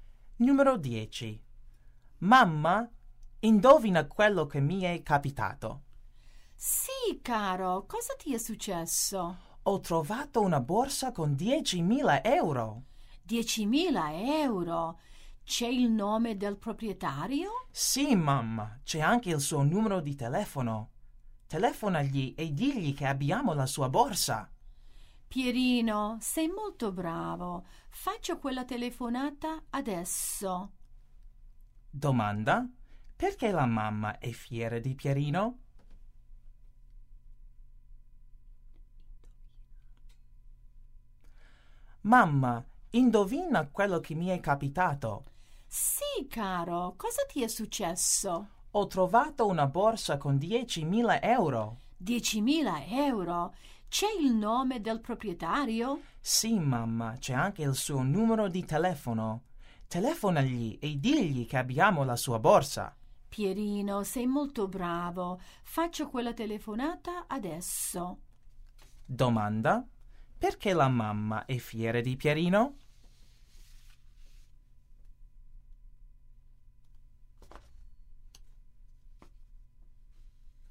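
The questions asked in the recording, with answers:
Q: Perché la mamma è fiera di Pierino?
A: Ha trovato una borsa con 10.000 euro e vuole restituirla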